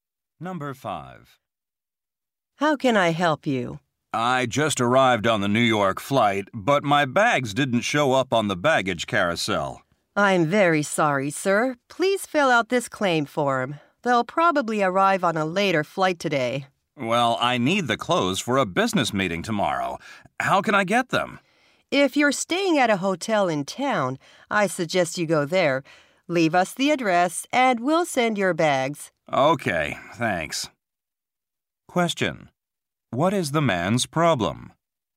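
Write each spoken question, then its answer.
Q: What is the man's problem?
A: His bags did not arrive and he needs his clothes for a meeting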